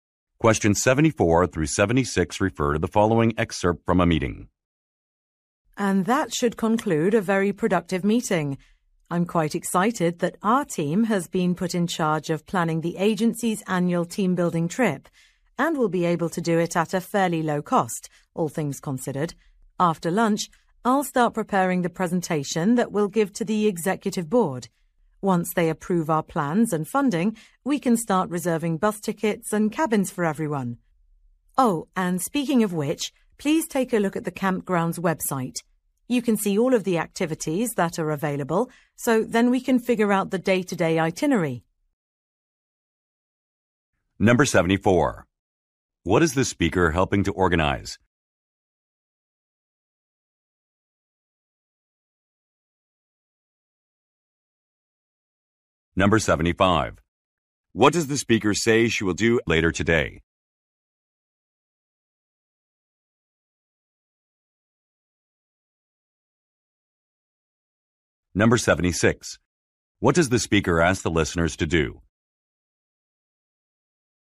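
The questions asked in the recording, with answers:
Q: What is the speaker helping to organize?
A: The agency's annual team-building trip

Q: What does the speaker say she will do later today?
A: Start preparing a presentation for the executive board

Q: What does the speaker ask the listeners to do?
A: Look at the campground's website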